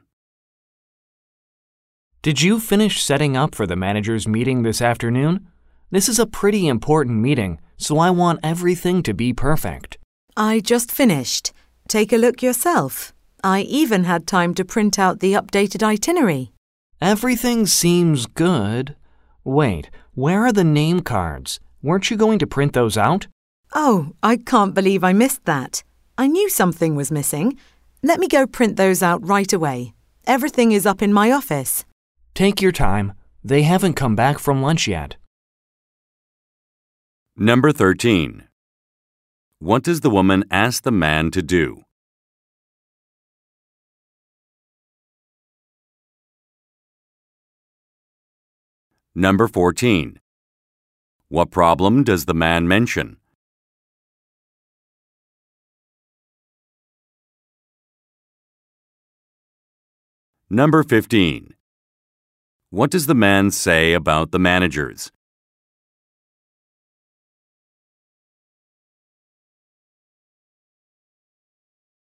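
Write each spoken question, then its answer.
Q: What problem does the man mention?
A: The name cards are missing

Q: What does the man say about the managers?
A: They haven't come back from lunch yet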